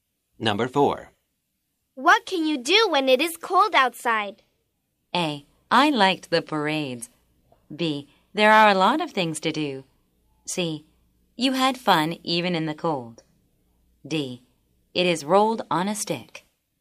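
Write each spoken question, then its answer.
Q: What can you do when it is cold outside?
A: B: There are a lot of things to do.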